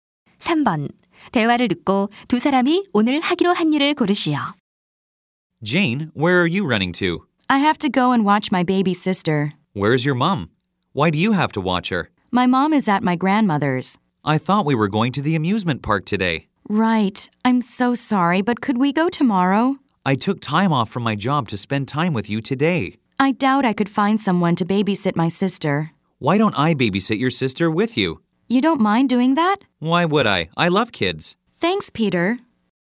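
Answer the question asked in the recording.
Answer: 여동생 함께 돌보기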